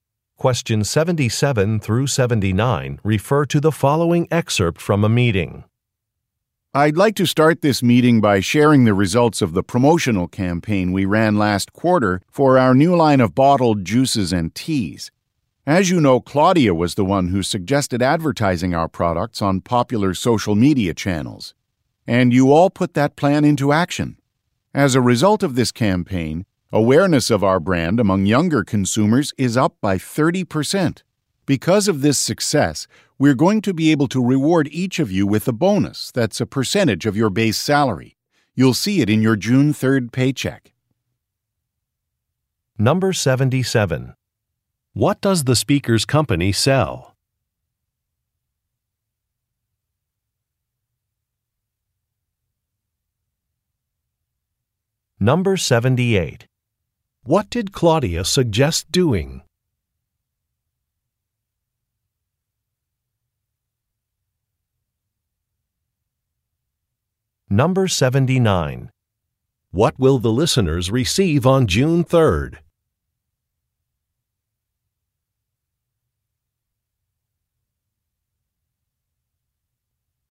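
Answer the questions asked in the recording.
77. Beverages (bottled juices and teas)
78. Advertising on social media
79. A bonus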